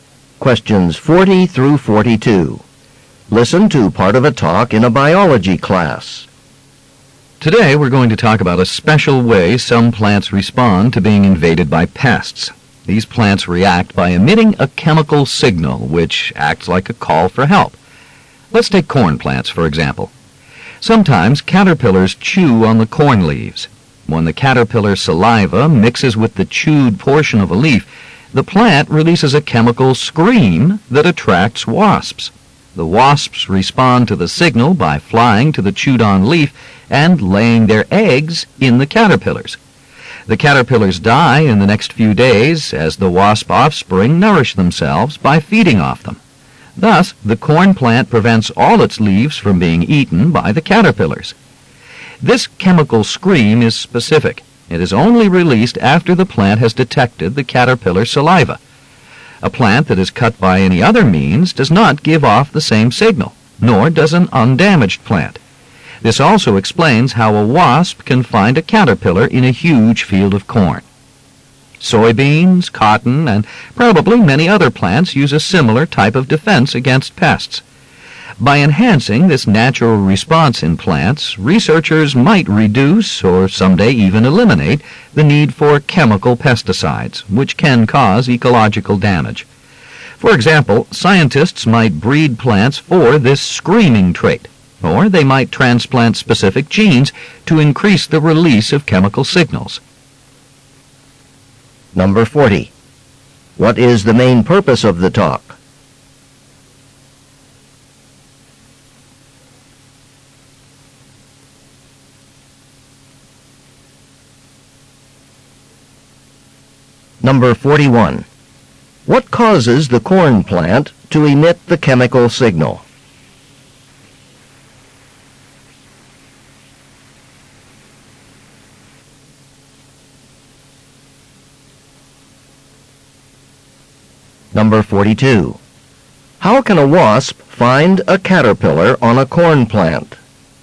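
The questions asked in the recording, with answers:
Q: What is the main purpose of the talk?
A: To explain how plants signal for help against pests

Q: What causes the corn plant to emit the chemical signal?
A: Caterpillar saliva on chewed leaves

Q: How can a wasp find a caterpillar on a corn plant?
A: By following the plant's chemical signal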